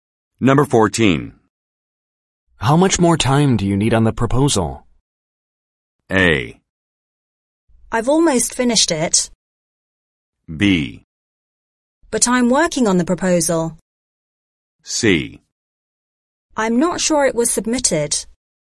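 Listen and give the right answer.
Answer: A: I've almost finished it.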